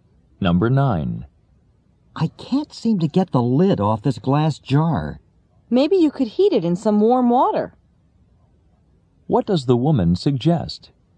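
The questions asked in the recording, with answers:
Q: What does the woman suggest?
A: Heating the jar in warm water.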